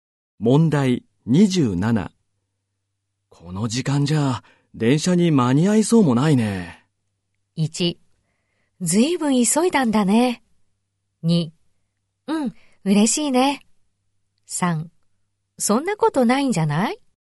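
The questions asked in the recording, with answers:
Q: この時間じゃ電車に間に合いそうもないね。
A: 3: そんなことないんじゃない?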